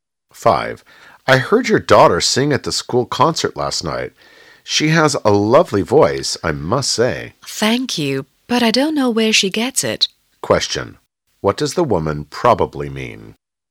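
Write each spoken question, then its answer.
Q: What does the woman probably mean?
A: She doesn't know where her daughter got her singing talent.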